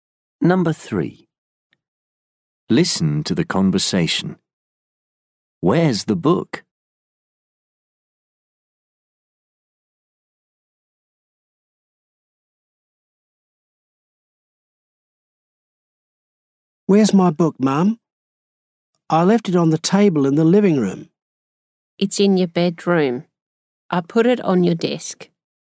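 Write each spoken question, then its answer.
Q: Where's the book?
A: On the desk in the bedroom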